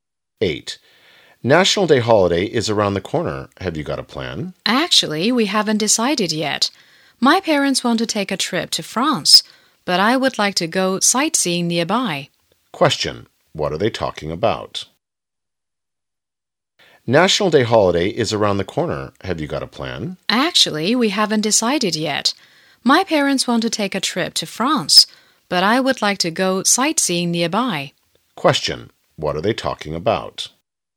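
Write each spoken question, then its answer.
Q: What are they talking about?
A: Their plans for the National Day holiday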